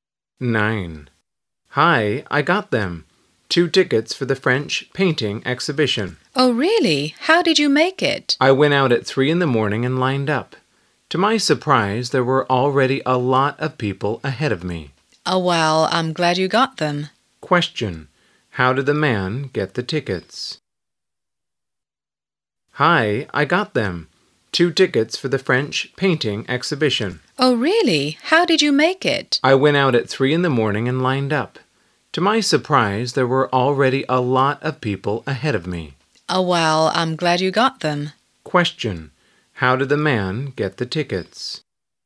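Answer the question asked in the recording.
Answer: He went out at 3 in the morning and lined up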